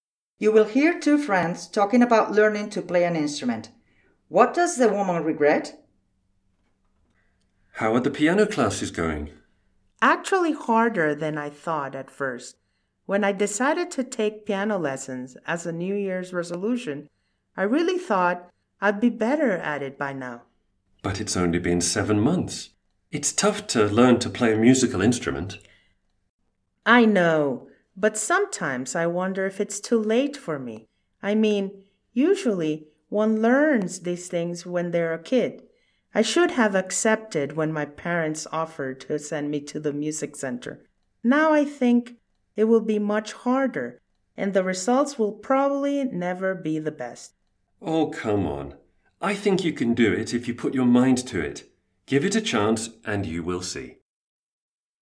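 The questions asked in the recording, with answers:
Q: What does the woman regret?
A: Not accepting her parents' offer to send her to music lessons as a child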